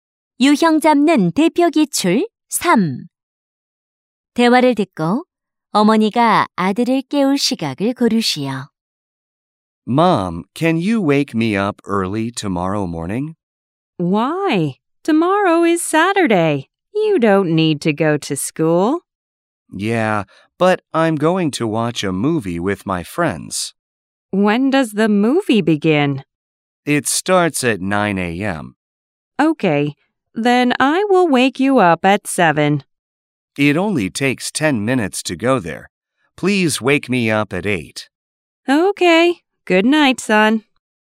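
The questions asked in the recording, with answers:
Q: 대화를 듣고 어머니가 아들을 깨울 시각을 고르시오.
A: 오전 8시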